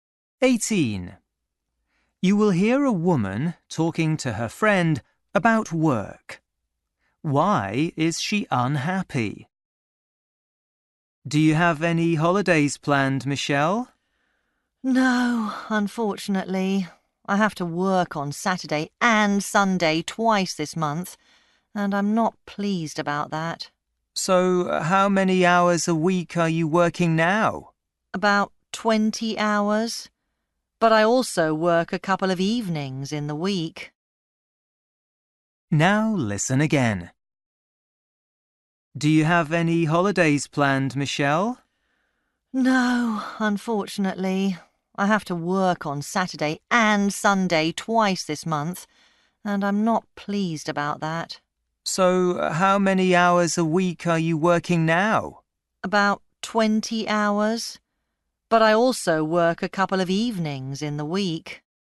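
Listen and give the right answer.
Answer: She has to work at weekends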